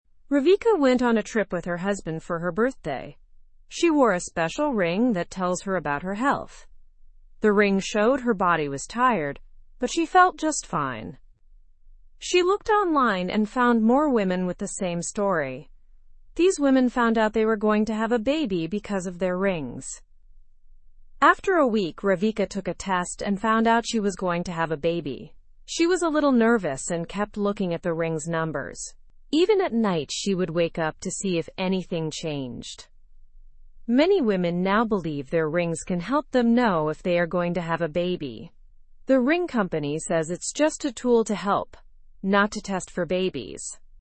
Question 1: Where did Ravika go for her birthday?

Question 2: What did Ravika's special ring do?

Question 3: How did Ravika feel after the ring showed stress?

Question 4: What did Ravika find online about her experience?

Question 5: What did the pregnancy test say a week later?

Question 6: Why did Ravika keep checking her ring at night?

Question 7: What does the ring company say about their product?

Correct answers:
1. With her husband on a holiday.
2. It checked her health.
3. She felt normal.
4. Other women had similar stories.
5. It was positive.
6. To see if the numbers changed.
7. It is just a helpful tool.

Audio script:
Ravika went on a trip with her husband for her birthday. She wore a special ring that tells her about her health. The ring showed her body was tired, but she felt just fine. She looked online and found more women with the same story. These women found out they were going to have a baby because of their rings.
After a week, Ravika took a test and found out she was going to have a baby. She was a little nervous and kept looking at the ring's numbers. Even at night, she would wake up to see if anything changed. Many women now believe their rings can help them know if they are going to have a baby. The ring company says it's just a tool to help, not to test for babies.

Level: (Level 1)